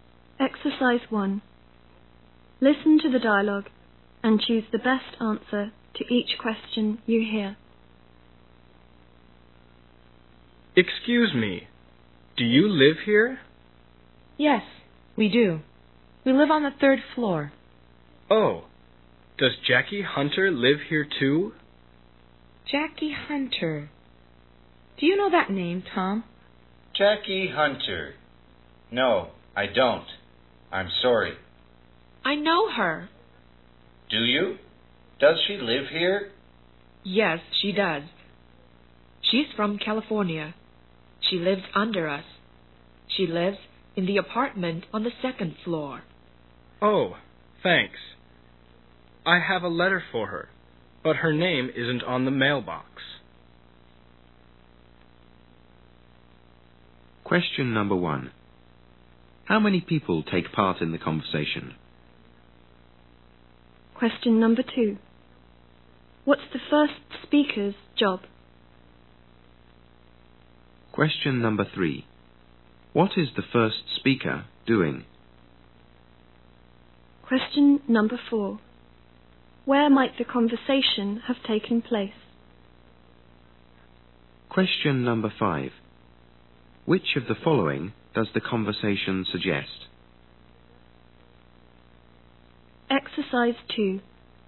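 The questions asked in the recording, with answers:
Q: How many people take part in the conversation?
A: Three

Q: What is the first speaker doing?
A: Trying to deliver a letter to Jackie Hunter

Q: Where might the conversation have taken place?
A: At an apartment building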